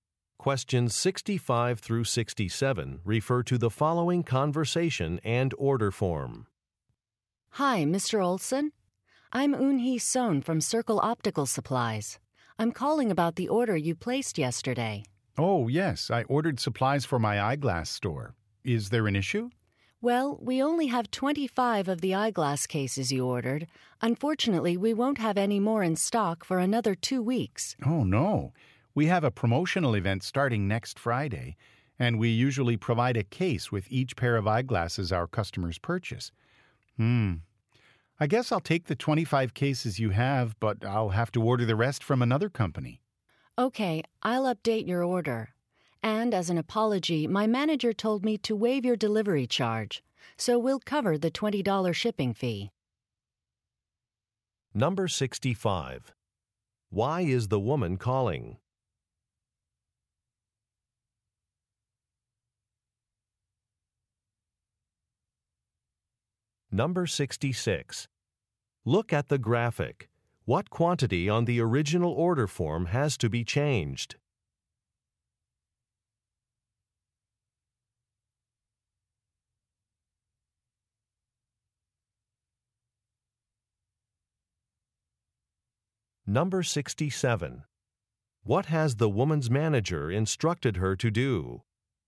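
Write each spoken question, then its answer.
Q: Why is the woman calling?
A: To say that some of the eyeglass cases Mr. Olson ordered are out of stock

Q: What has the woman's manager instructed her to do?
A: Waive the $20 delivery charge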